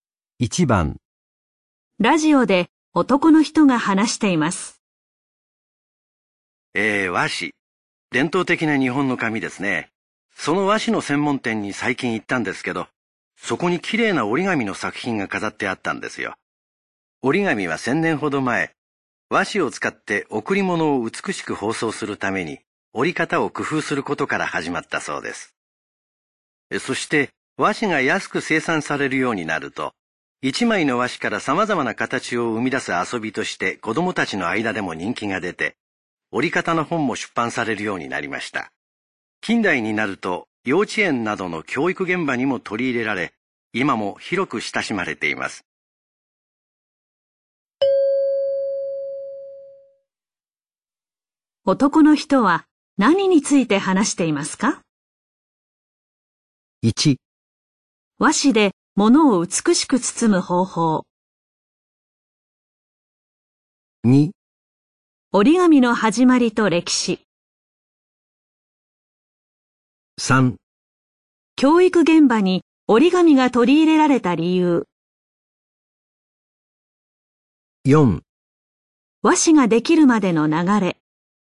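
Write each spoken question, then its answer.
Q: 男の人は何について話していますか?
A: 2: 折り紙の始まりと歴史。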